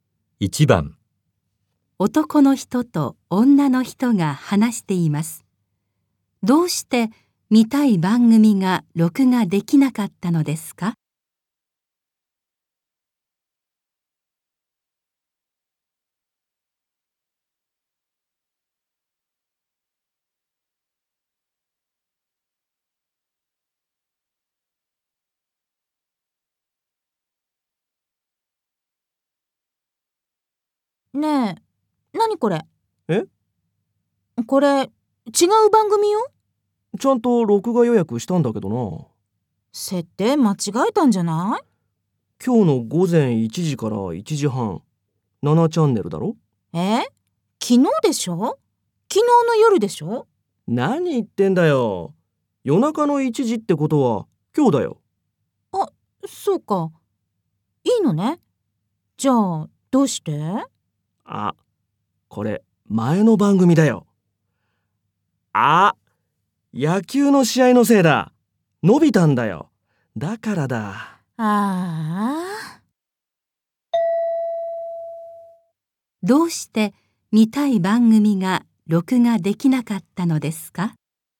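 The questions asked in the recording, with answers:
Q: どうして見たい番組が録画できなかったのですか?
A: 野球の試合が延びて、番組の時間がずれたから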